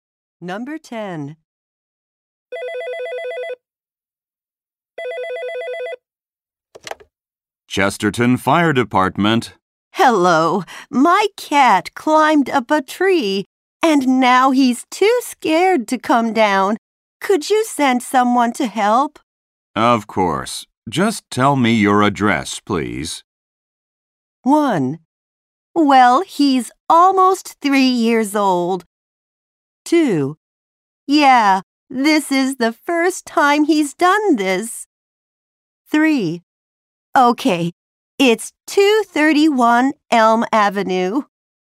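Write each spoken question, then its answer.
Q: Of course. Just tell me your address, please.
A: 3: Okay, it's 231 Elm Avenue.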